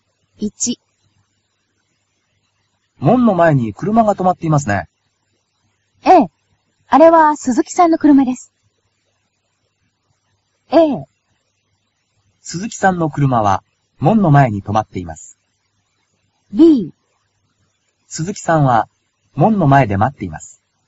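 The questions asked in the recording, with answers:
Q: 門の前に車が止まっていますね。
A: A: 鈴木さんの車は門の前に止まっています。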